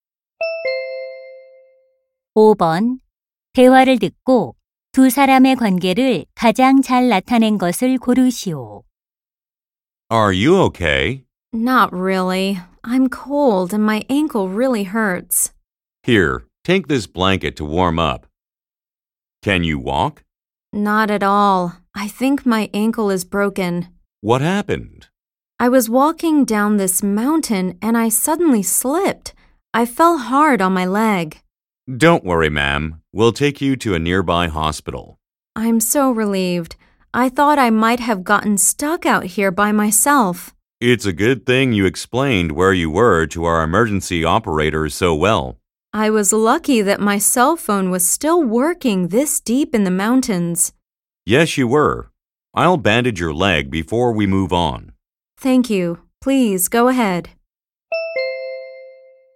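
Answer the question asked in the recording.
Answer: 조난자(등산객) - 구조대원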